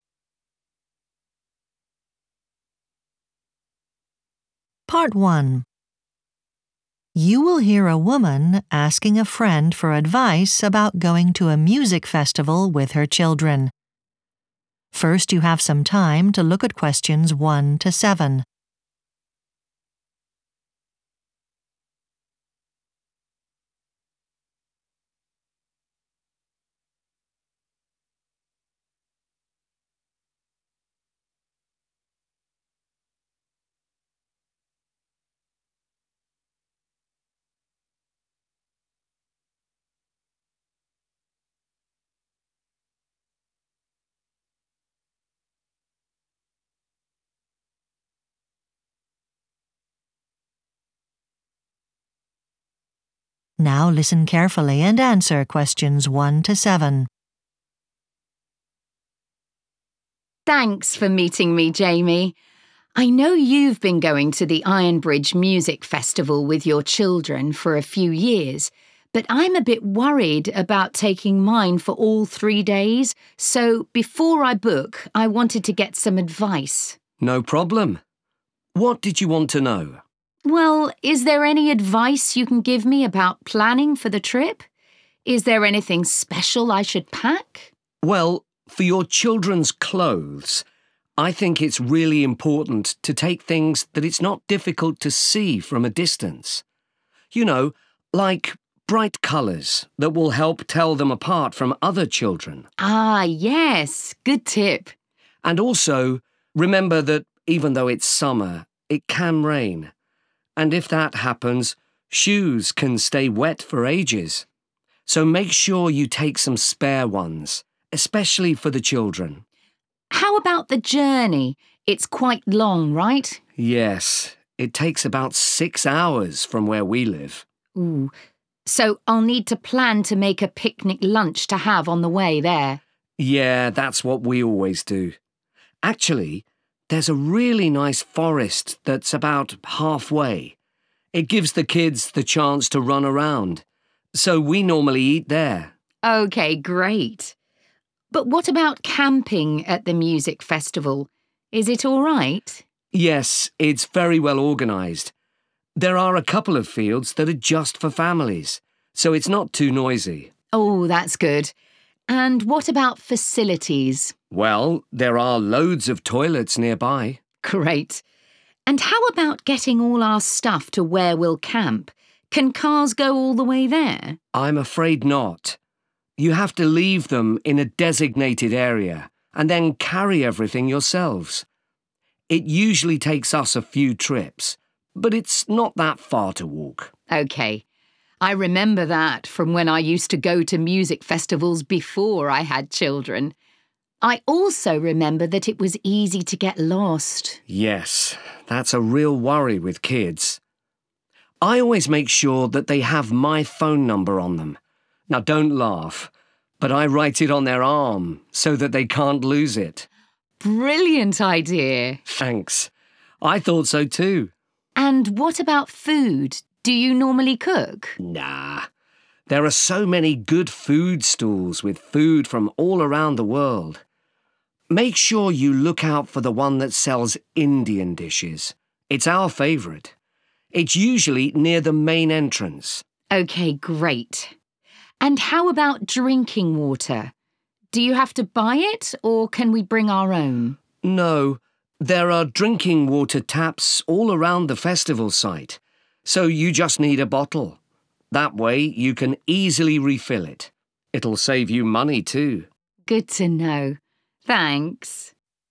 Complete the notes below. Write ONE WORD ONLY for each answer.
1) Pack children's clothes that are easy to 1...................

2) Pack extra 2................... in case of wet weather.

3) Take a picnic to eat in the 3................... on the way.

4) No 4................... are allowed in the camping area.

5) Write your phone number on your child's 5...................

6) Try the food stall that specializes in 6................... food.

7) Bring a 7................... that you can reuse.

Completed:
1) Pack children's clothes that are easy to see
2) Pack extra shoes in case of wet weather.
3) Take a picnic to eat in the forest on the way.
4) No cars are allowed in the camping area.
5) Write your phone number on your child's arm
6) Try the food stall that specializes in Indian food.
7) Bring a bottle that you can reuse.